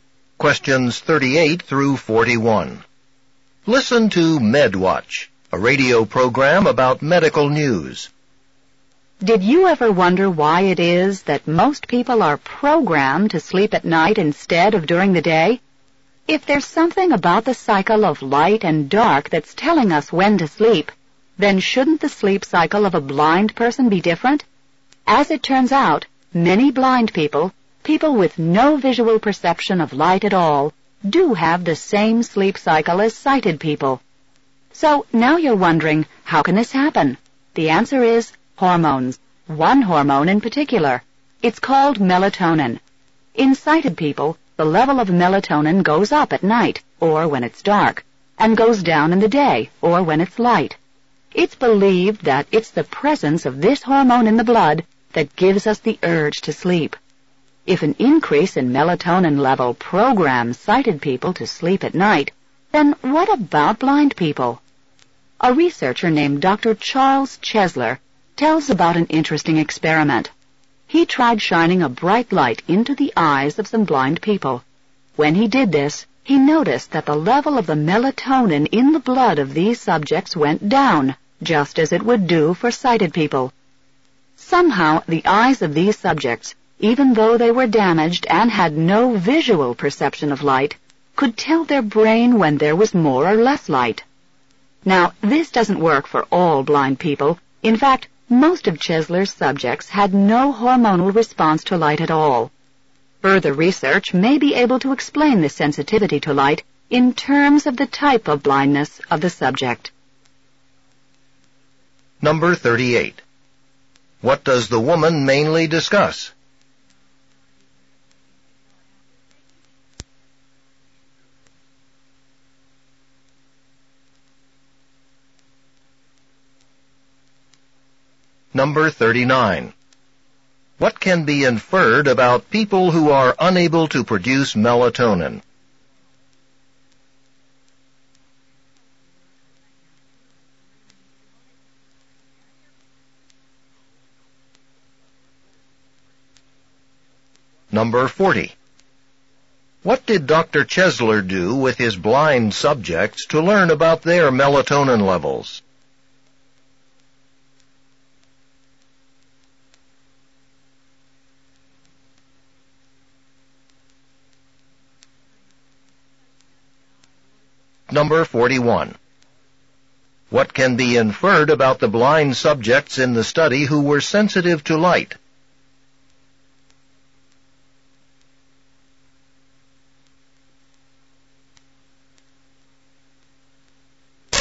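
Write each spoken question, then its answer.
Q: What does the woman mainly discuss?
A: How hormones (melatonin) regulate the sleep cycle, including in blind people

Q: What did Dr. Chesler do with his blind subjects to learn about their melatonin levels?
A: He shone a bright light into their eyes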